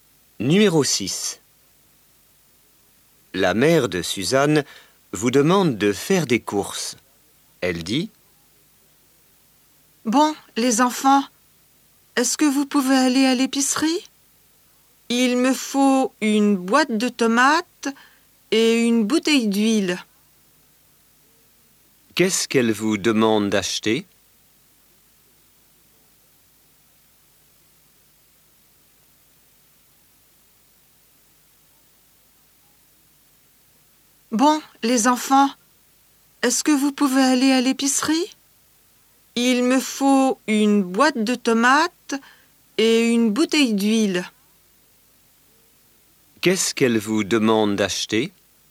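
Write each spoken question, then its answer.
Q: Qu'est-ce qu'elle vous demande d'acheter?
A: Une boîte de tomates et une bouteille d'huile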